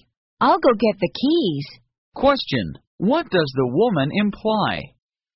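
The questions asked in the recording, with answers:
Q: what does the woman imply?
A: She agrees to go to the concert.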